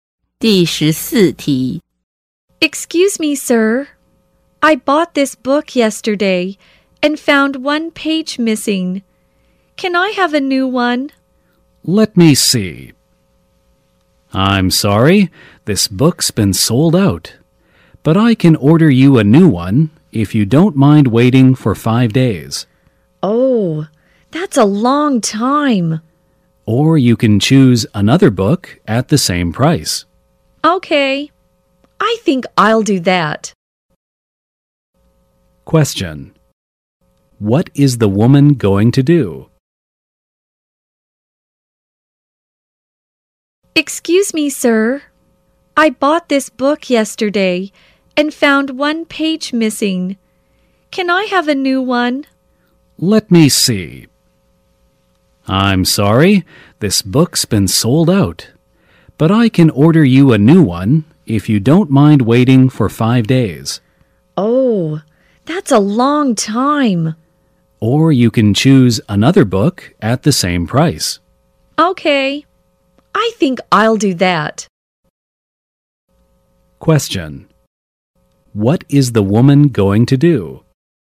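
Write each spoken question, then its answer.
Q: What is the woman going to do?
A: Choose another book at the same price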